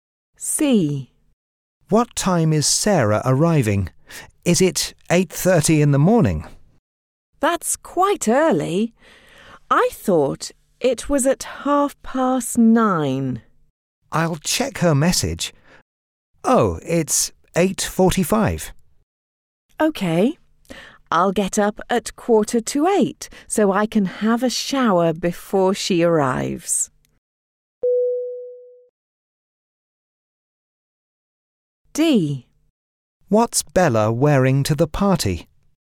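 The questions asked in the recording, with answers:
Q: What time is Sarah arriving?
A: 8:45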